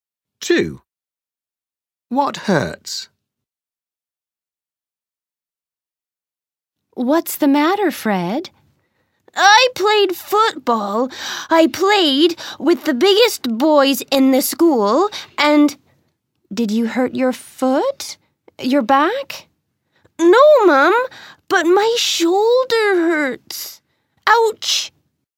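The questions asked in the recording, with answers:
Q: What hurts?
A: his shoulder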